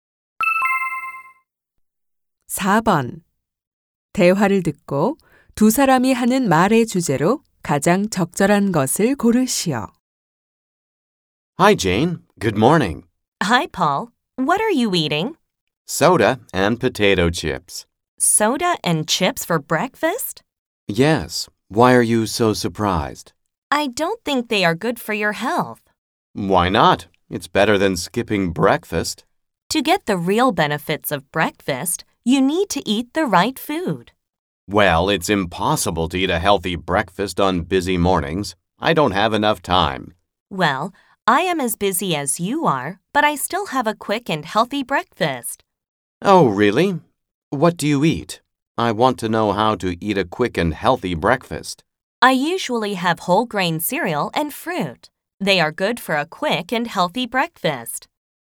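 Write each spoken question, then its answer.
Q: 대화를 듣고 두 사람이 하는 말의 주제로 가장 적절한 것을 고르시오.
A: 빠르고 건강한 아침 식사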